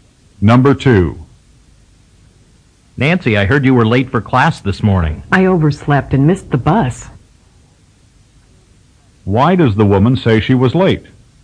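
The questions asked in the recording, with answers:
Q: Why does the woman say she was late?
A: She overslept and missed the bus.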